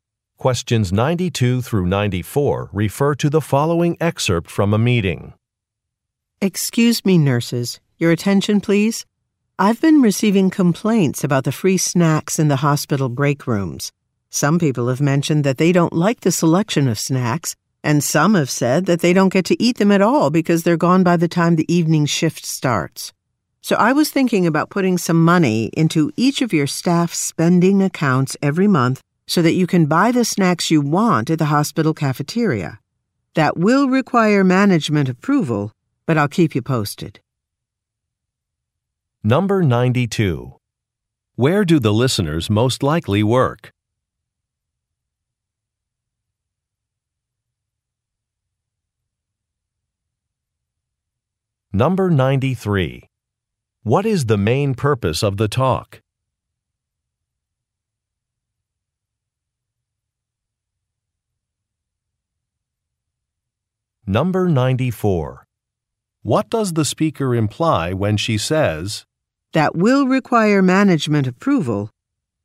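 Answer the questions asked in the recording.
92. At a hospital
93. To address complaints about the break-room snacks and suggest a solution
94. The plan is not final yet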